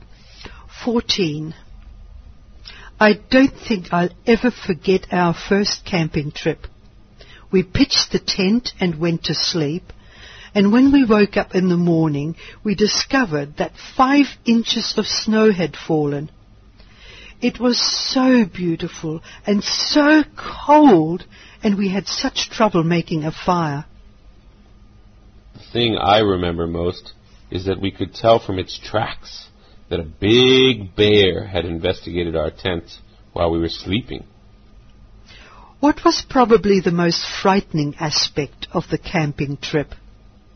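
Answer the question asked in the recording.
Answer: A big bear had investigated their tent while they slept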